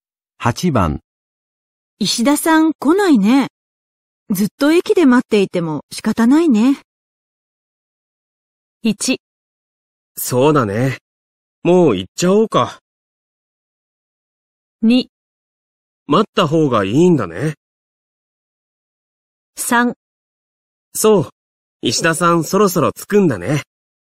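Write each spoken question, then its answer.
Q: 石田さん来ないね。ずっと駅で待っていても仕方ないね。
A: 1: そうだね。もう行っちゃおうか。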